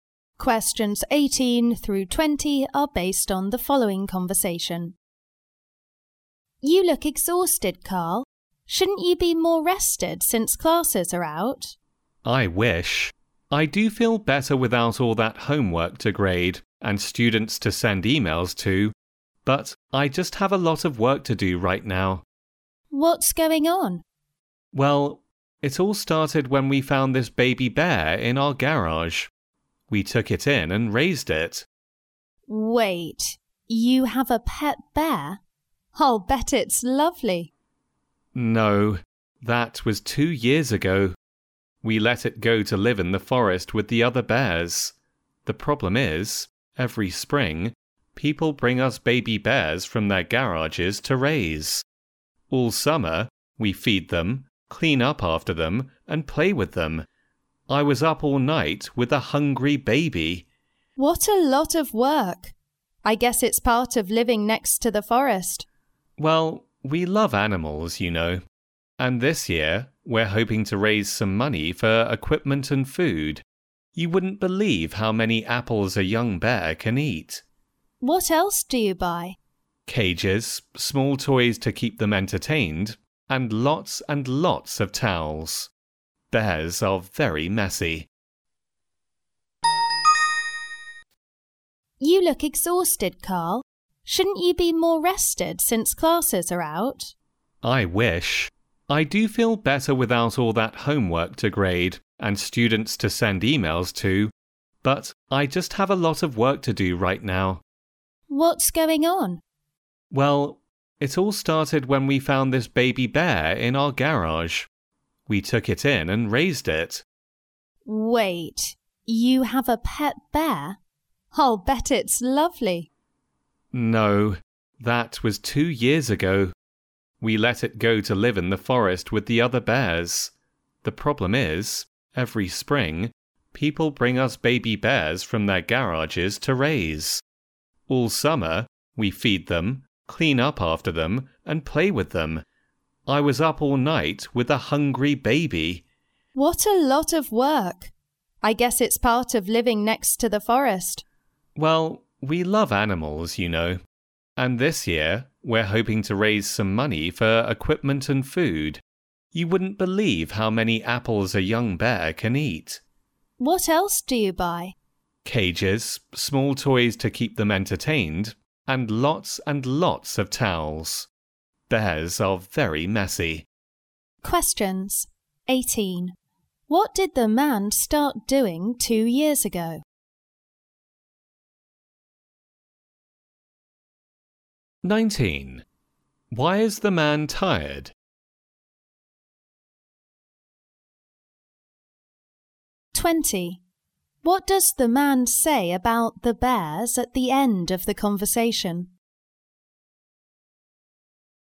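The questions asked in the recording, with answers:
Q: What did the man start doing 2 years ago?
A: Raising baby bears

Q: Why is the man tired?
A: He was up all night with a hungry baby bear

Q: What does the man say about the bears at the end of the conversation?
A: They are very messy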